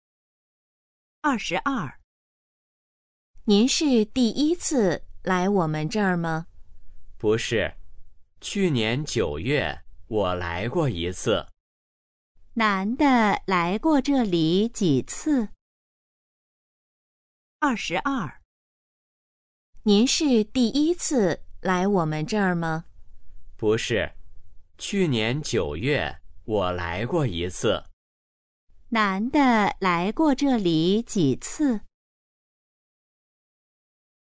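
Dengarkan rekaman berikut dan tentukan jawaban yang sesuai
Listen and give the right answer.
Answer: 一次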